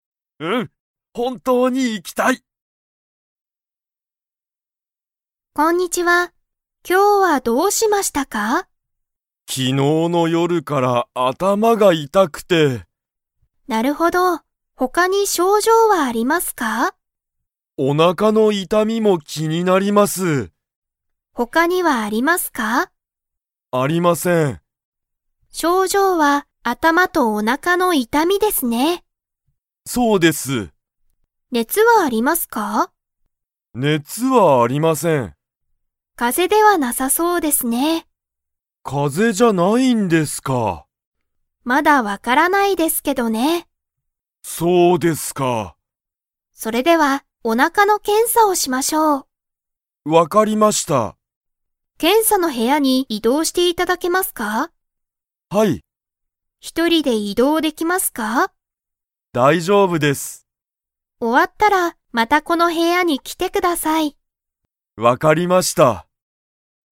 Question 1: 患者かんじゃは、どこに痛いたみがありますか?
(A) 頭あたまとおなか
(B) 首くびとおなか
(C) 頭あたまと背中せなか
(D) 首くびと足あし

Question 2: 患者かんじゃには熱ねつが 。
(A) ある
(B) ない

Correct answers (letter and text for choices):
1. (A) 頭あたまとおなか
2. (B) ない

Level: Level 4